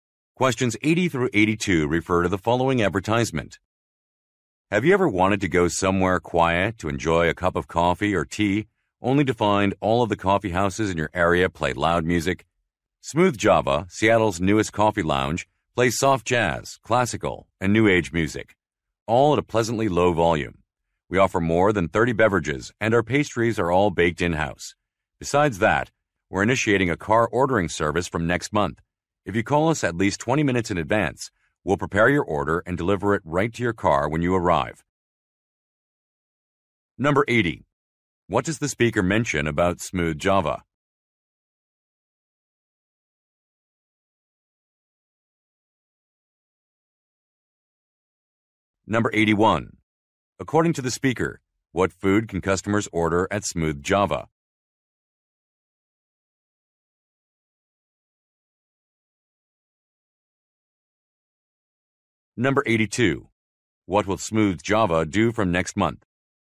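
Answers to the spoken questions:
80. It is new and plays quiet music.
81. Pastries baked in-house.
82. Start a car ordering service, delivering orders to customers' cars.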